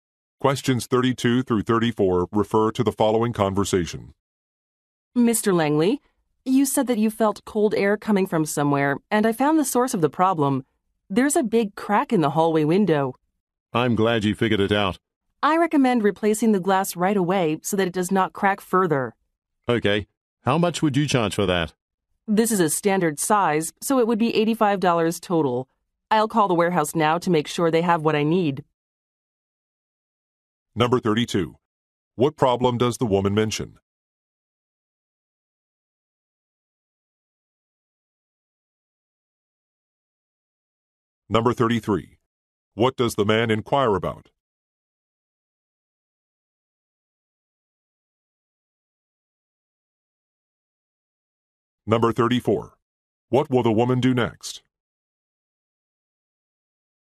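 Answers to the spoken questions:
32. There is a big crack in the hallway window
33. The cost of replacing the glass
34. Call the warehouse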